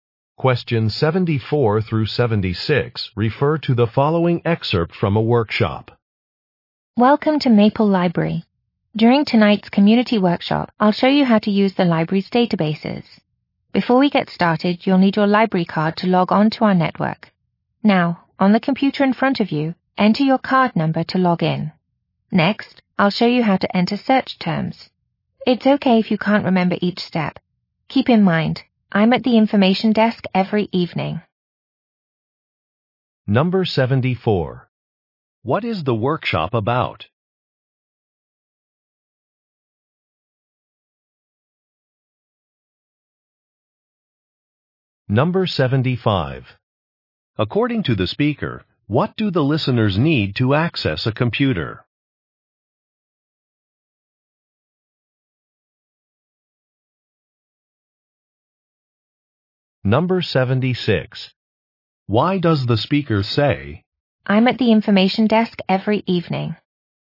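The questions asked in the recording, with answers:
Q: What is the workshop about?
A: Using the library's databases

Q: According to the speaker, what do the listeners need to access a computer?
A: A library card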